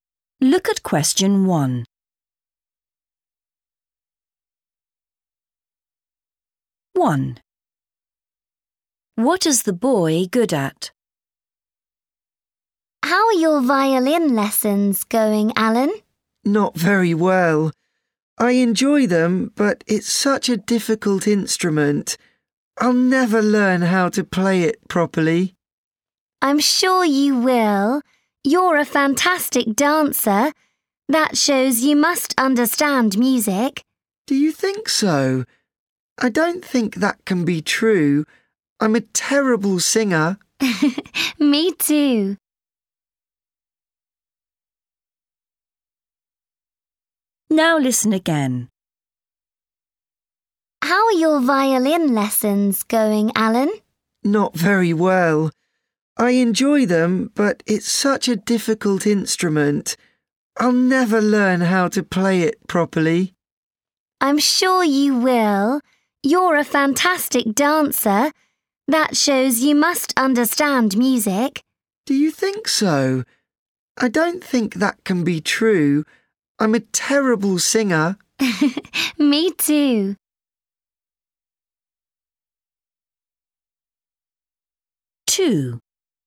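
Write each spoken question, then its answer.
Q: What is the boy good at?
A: dancing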